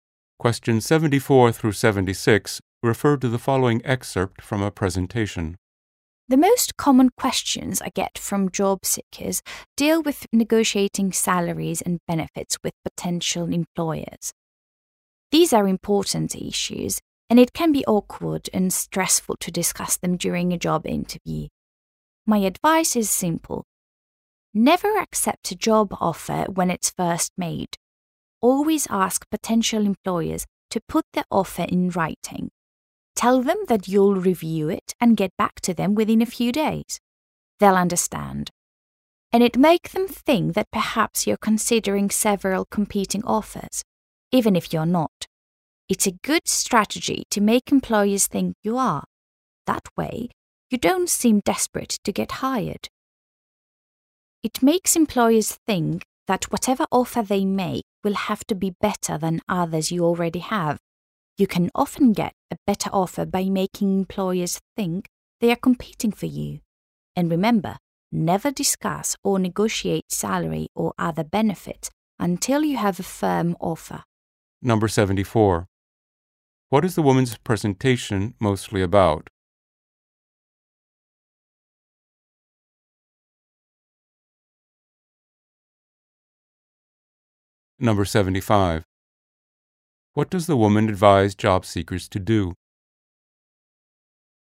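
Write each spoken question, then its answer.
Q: What is the woman's presentation mostly about?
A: Negotiating salaries and benefits with employers

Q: What does the woman advise job seekers to do?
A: Ask for the job offer in writing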